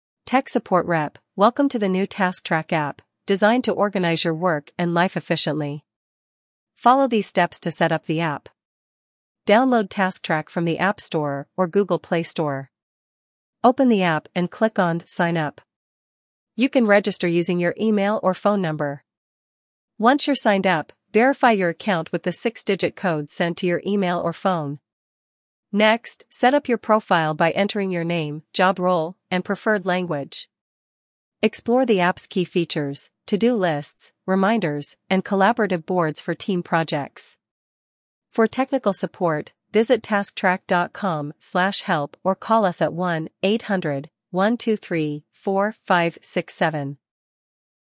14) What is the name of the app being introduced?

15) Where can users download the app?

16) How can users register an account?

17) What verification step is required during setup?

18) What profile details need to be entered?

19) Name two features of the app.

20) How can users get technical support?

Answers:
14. TaskTrack
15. App Store or Google Play Store
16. Email or phone number
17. Entering a six-digit verification code
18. Name, job role, preferred language
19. To-Do Lists and Reminders
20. tasktrack.com/help or 1-800-123-4567

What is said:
Tech Support Rep: Welcome to the new TaskTrack app, designed to organize your work and life efficiently. Follow these steps to set up the app:
Download TaskTrack from the App Store or Google Play Store.
Open the app and click on "Sign Up." You can register using your email or phone number.
Once you're signed up, verify your account with the six-digit code sent to your email or phone.
Next, set up your profile by entering your name, job role, and preferred language.
Explore the app's key features: To-Do Lists, Reminders, and Collaborative Boards for team projects.
For technical support, visit tasktrack.com/help or call us at 1-800-123-4567.